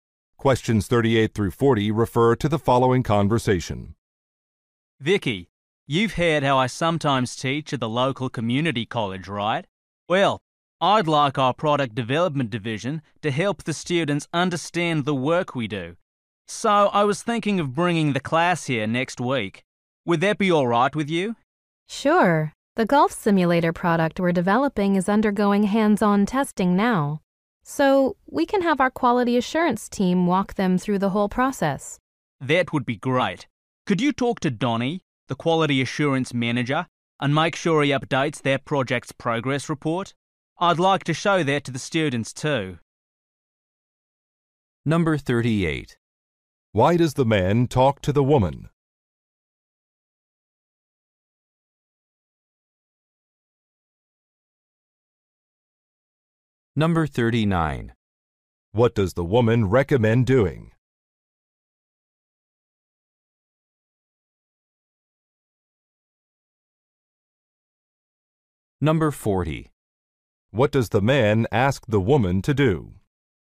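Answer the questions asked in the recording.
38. To ask about bringing his class to visit
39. Having the quality assurance team walk the students through the testing process
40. Talk to Donnie about updating the progress report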